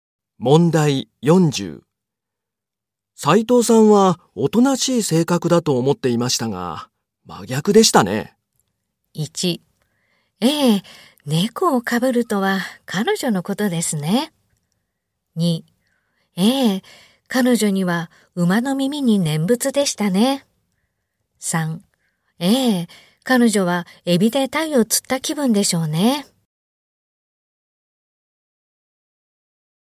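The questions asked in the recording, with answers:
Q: 斉藤さんはおとなしい性格だと思っていましたが、真逆でしたね。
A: 1: ええ、猫をかぶるとは彼女のことですね。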